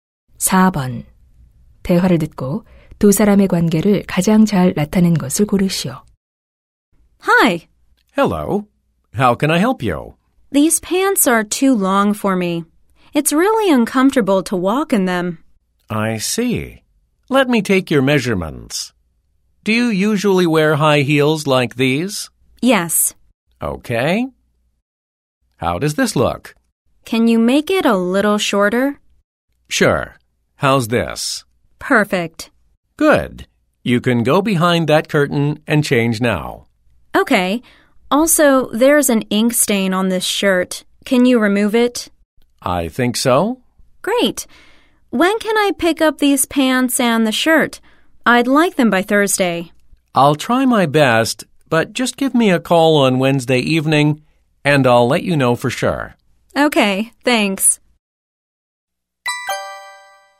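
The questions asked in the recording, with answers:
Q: 대화를 듣고 두 사람의 관계를 가장 잘 나타낸 것을 고르시오.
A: 손님 - 수선집(세탁소) 직원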